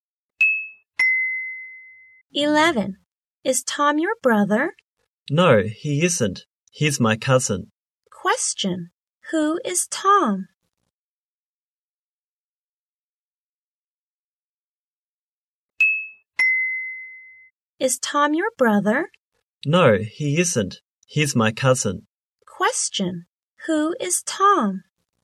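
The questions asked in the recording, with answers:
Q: Who is Tom?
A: His cousin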